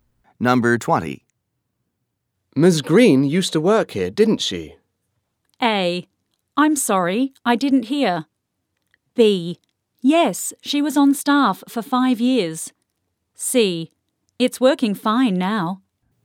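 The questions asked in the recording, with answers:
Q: Ms. Green used to work here, didn't she?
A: B: Yes, she was on staff for 5 years.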